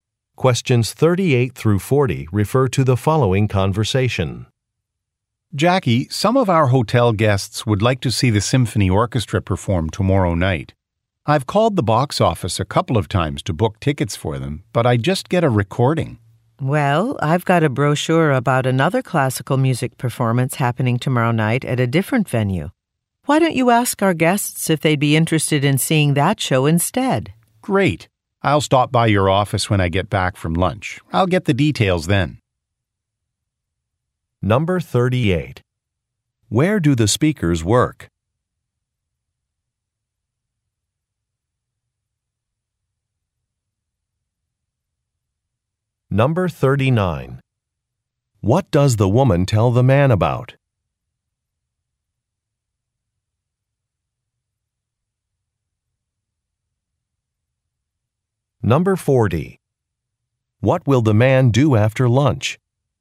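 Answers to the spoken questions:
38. At a hotel
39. Another classical music performance
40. Stop by the woman's office to get the details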